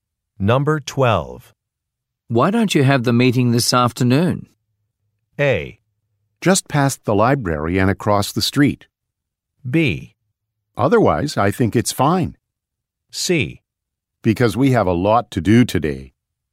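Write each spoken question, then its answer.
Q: Why don't you have the meeting this afternoon?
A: C: Because we have a lot to do today.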